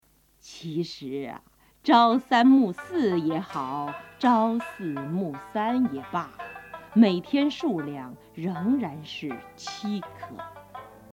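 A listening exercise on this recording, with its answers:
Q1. 〇〇啊,朝三暮四也好,朝四暮三也罢,每天数量,仍然是七颗。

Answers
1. 其实 qíshí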